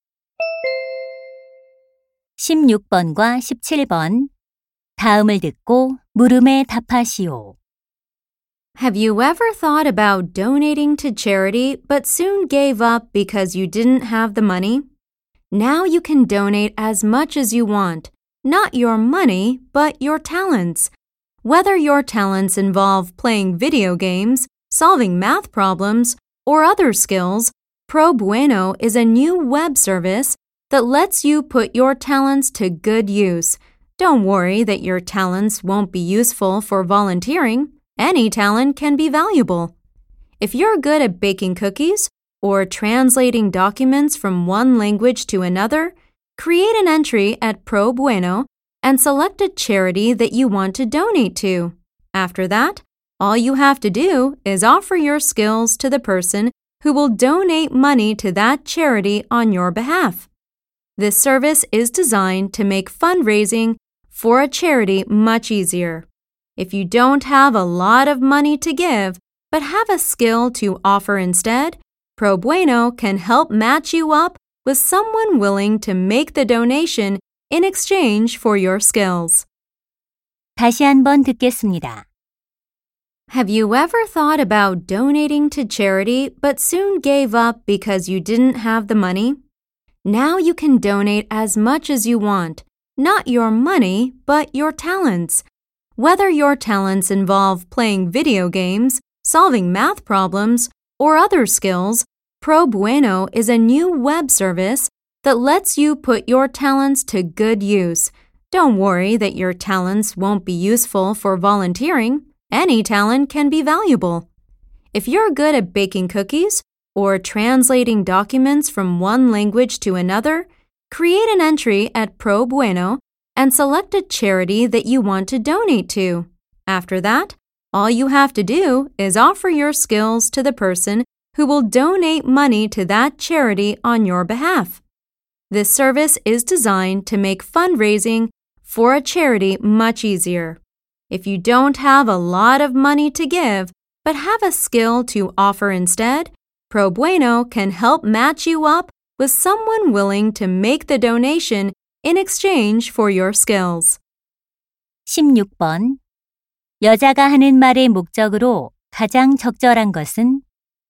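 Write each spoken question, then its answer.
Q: 여자가 하는 말의 목적으로 가장 적절한 것은?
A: 재능 기부를 돕는 웹 서비스를 홍보하려고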